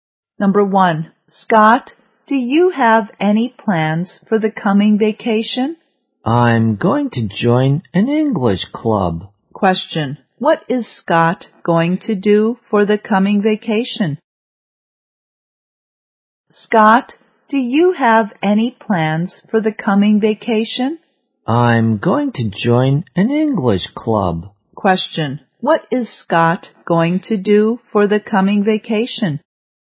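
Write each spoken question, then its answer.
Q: What is Scott going to do for the coming vacation?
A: Join an English club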